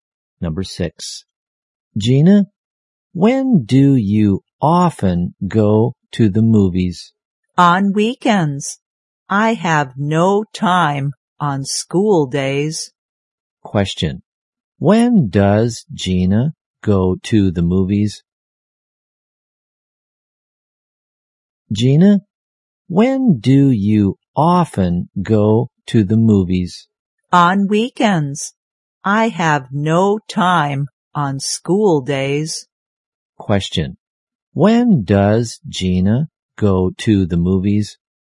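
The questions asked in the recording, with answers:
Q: when does Gina go to the movies?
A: On weekends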